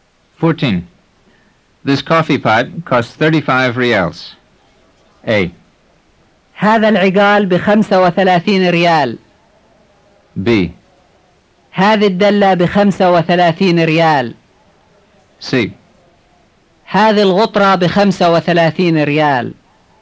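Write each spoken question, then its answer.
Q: This coffee pot costs 35 reals.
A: B: هذه الدلة بخمسة وثلاثين ريال.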